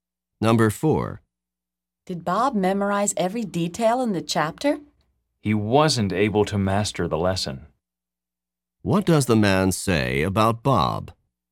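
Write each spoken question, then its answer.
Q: What does the man say about Bob?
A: Bob couldn't master the lesson.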